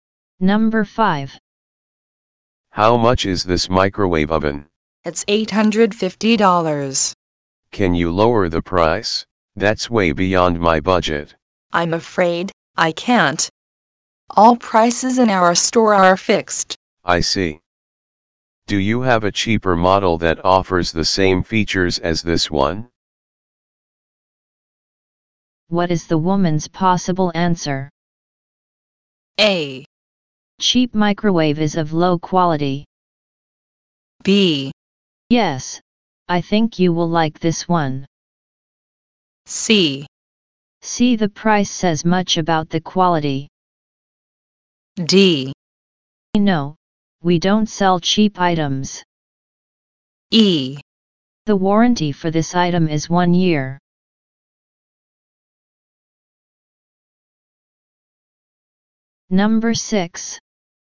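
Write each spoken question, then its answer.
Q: What is the woman's possible answer?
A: B: Yes, I think you will like this one.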